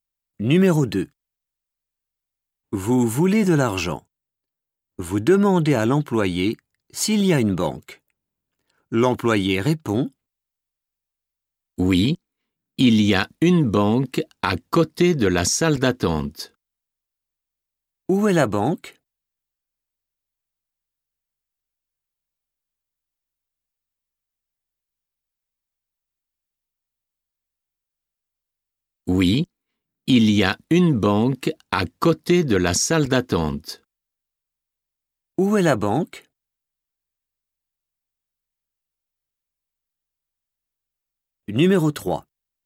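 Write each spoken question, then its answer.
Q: Où est la banque?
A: À côté de la salle d'attente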